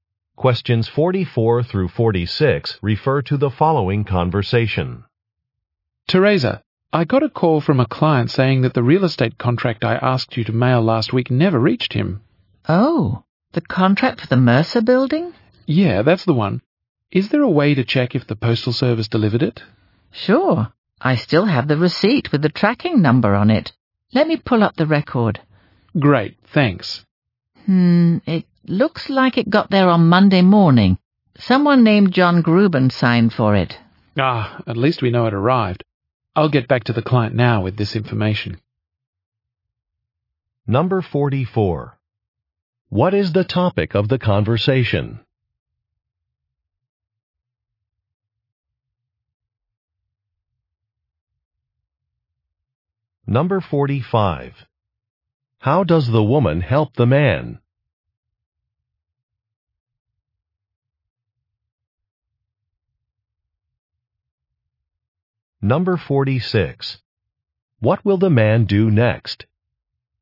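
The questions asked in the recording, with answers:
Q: What is the topic of the conversation?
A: A mailed contract the client says he didn't receive

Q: How does the woman help the man?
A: She checks the delivery with the tracking number

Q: What will the man do next?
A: Contact the client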